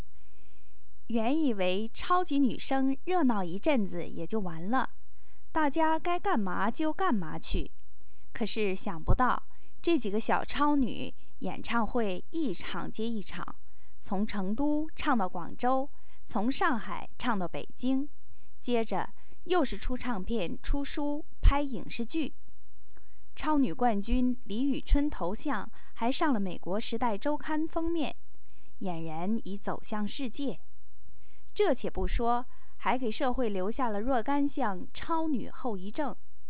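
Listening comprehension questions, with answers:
Please answer the following questions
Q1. 李宇春的头像上了什么杂志的封面?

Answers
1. 美国《时代周刊》

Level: 3rd Year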